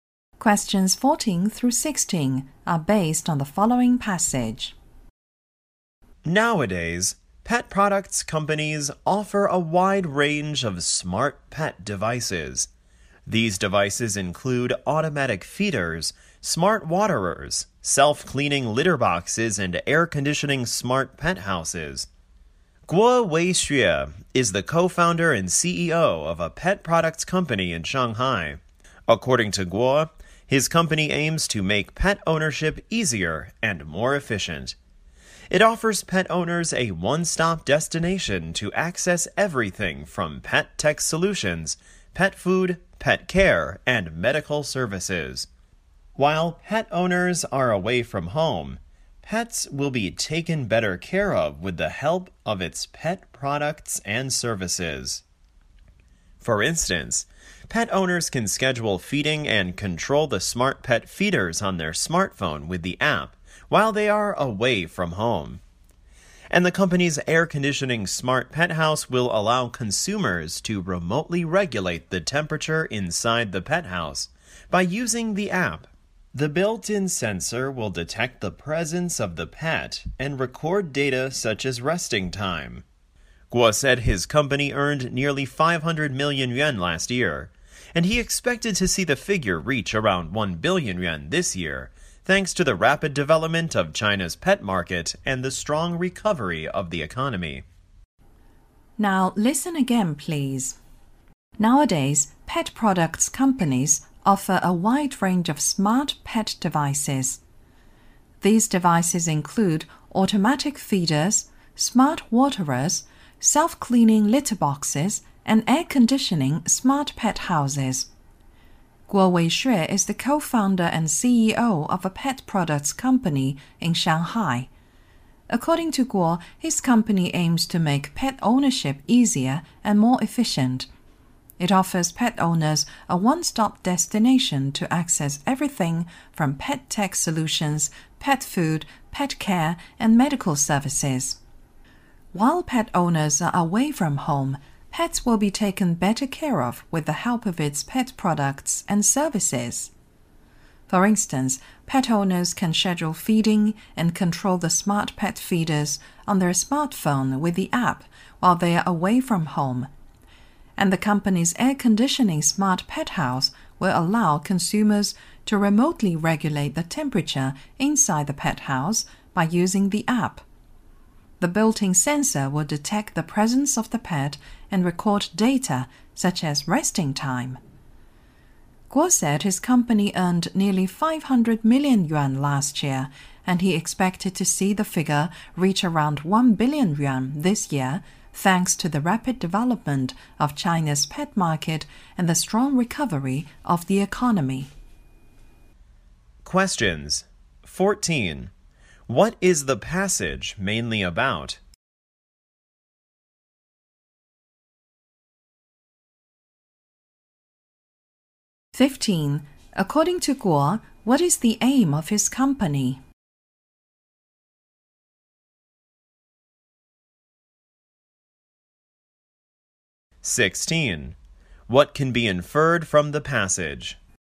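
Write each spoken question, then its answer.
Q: What is the passage mainly about?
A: Smart pet products and services from a Shanghai company

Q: According to Guo, what is the aim of his company?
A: To make pet ownership easier and more efficient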